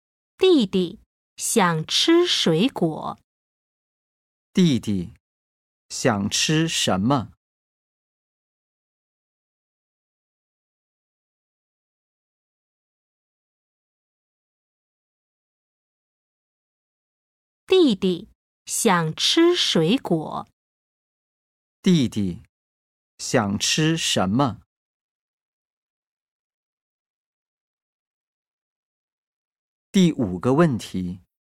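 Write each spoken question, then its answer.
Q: 弟弟想吃什么?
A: 水果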